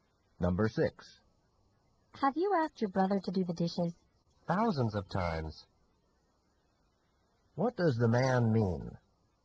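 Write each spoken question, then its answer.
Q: What does the man mean?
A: He has asked his brother many times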